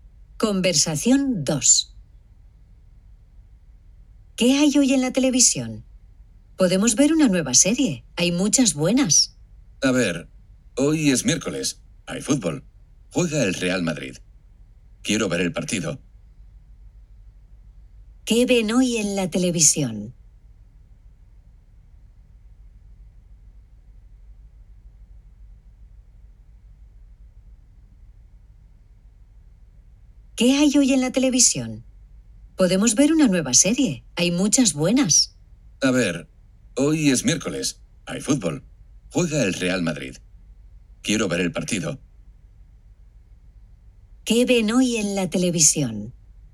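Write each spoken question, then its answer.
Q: ¿Qué ven hoy en la televisión?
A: Un partido de fútbol (el Real Madrid)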